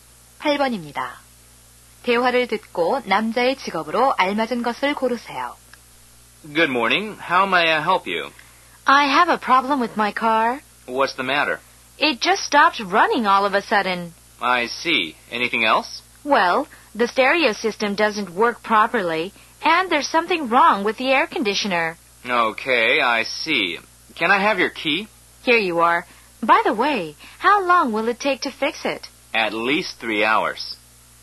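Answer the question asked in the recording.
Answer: 자동차 정비사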